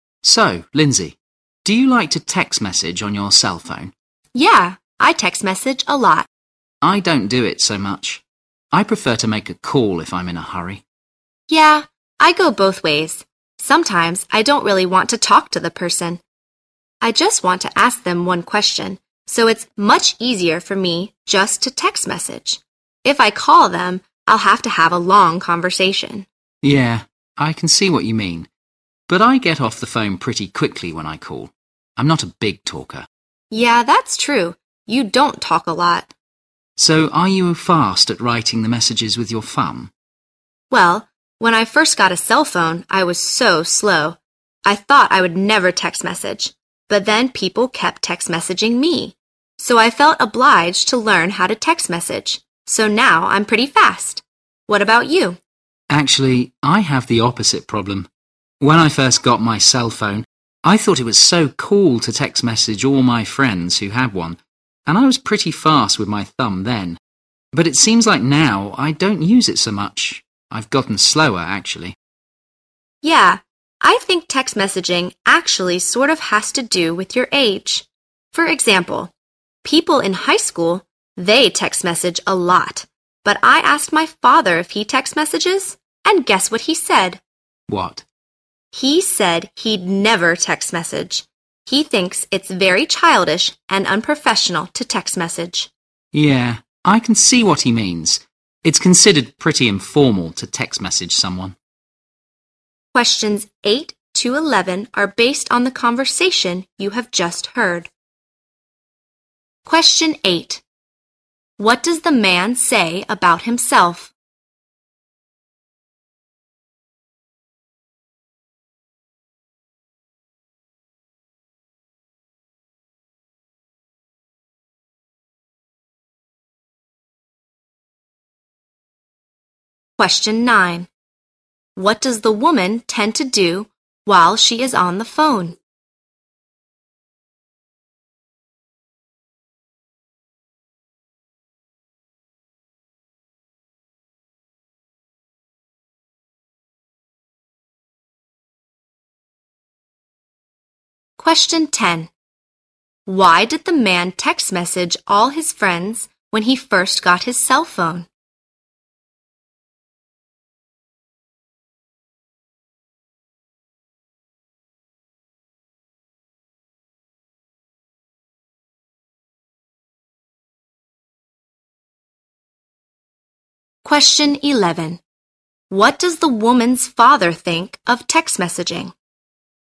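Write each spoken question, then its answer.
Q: Why did the man text message all his friends when he first got his cell phone?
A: He thought it was cool

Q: What does the woman's father think of text messaging?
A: It is childish and unprofessional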